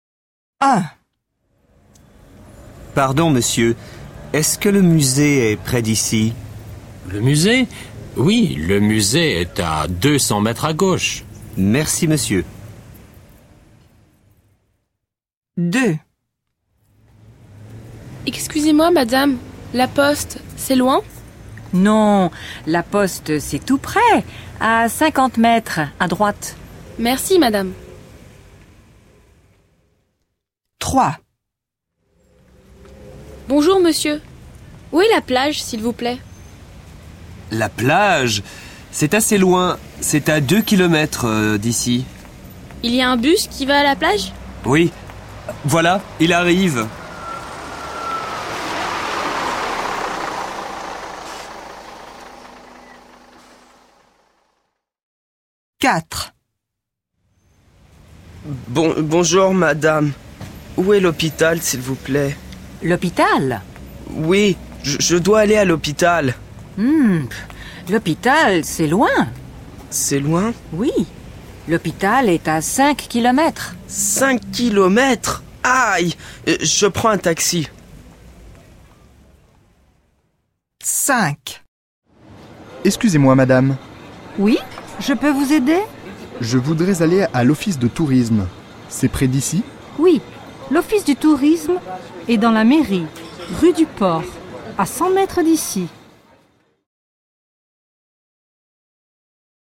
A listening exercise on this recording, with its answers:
Copie dans ton cahier, écoute et écris les réponses.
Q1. Le musée est à ...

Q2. La poste est à ...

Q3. La plage est à ...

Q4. L'hôpital est à ....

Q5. L'office du tourisme est ....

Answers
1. deux cents mètres à gauche.
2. cinquante mètres à droite.
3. deux kilomètres. Il y a un bus.
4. cinq kilomètres. Il va en taxi.
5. dans la mairie, rue du port, à cent mètres d'ici.

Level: 2o ESO